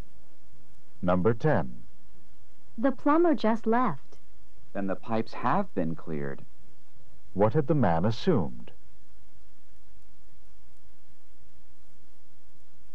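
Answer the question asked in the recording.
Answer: That the pipes hadn't been cleared.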